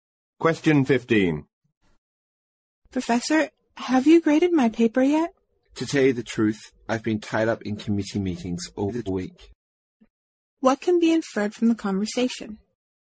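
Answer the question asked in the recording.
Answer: The professor hasn't graded the paper yet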